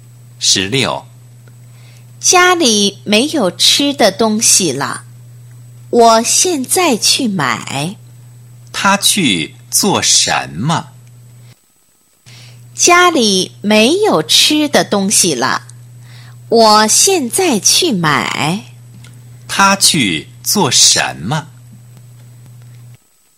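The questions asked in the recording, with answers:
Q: 他去做什么?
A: 去买吃的东西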